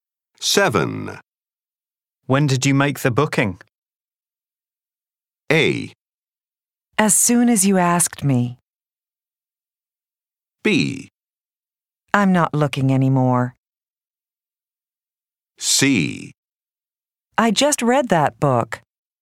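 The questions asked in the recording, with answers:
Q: When did you make the booking?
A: A: As soon as you asked me.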